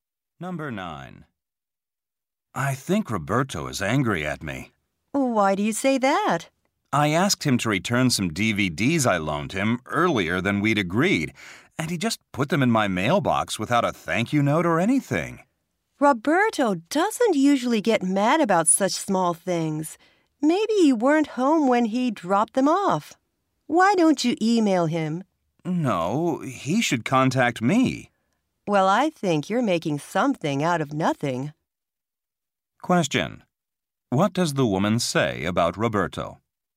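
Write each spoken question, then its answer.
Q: What does the woman say about Roberto?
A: He doesn't usually get angry about small things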